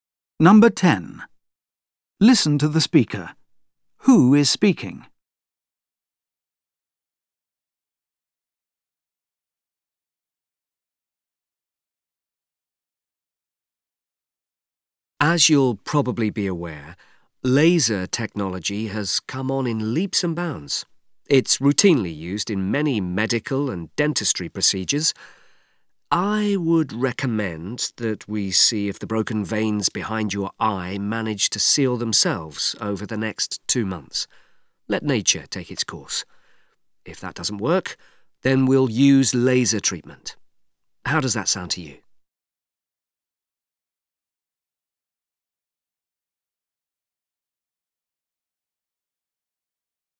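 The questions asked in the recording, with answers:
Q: Who is speaking?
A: A doctor (eye specialist)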